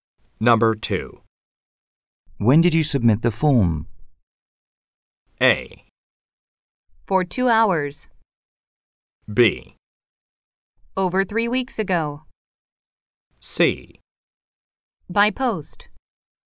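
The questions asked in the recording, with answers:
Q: When did you submit the form?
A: B: Over 3 weeks ago.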